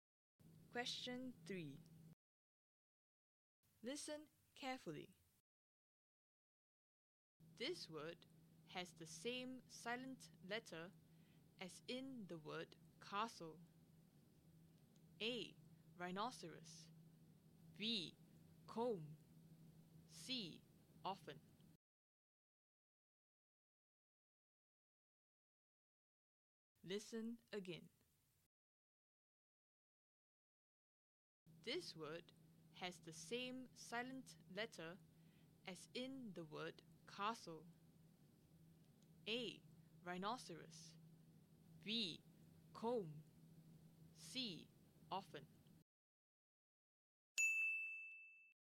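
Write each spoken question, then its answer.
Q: This word has the same silent letter as in the word castle.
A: C: Often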